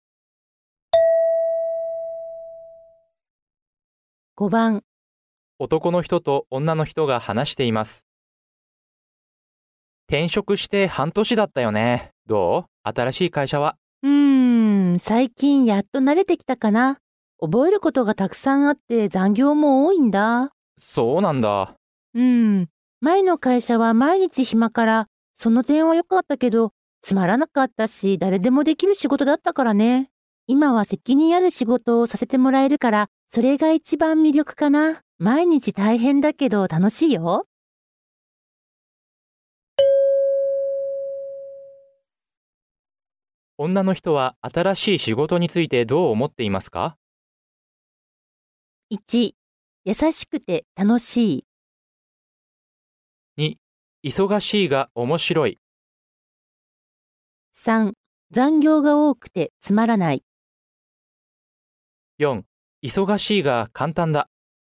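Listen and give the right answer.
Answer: 2: 忙しいが面白い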